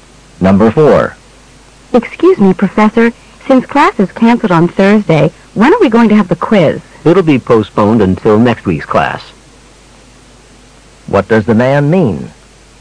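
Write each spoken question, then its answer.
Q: What does the man mean?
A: The quiz will be given in next week's class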